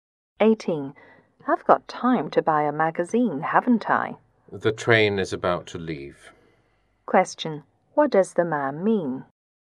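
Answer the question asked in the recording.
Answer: There is no time to buy a magazine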